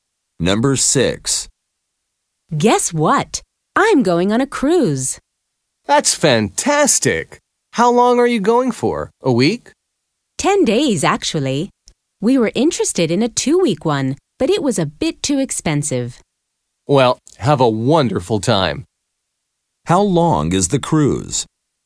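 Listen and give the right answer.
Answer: 10 days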